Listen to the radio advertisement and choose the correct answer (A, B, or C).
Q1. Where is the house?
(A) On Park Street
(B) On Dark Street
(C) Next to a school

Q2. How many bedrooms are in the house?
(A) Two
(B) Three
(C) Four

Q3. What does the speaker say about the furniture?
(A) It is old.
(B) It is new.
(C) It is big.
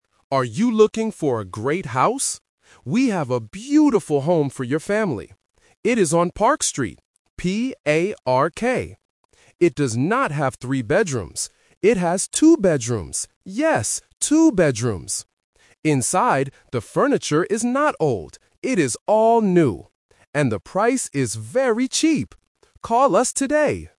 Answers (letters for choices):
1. A
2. A
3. B

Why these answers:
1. The voiceover spells the name of the street clearly: "P-A-R-K". Option (B) "Dark Street" is a sound-alike trap to test if the listener can distinguish between the "P" and "D" sounds. Option (C) is a plausible location but is never mentioned.
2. The speaker says, "It has two bedrooms. Yes, two bedrooms." Option (B) is the trap because the speaker mentions "three bedrooms" but immediately rejects it ("It does not have three bedrooms"). Option (C) is not mentioned.
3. The advertisement states, "the furniture is not old. It is all new." Option (A) is the trap because the word "old" is mentioned, but the sentence is negative ("not old"). Option (C) is a common adjective for furniture but is absent from the audio.

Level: A1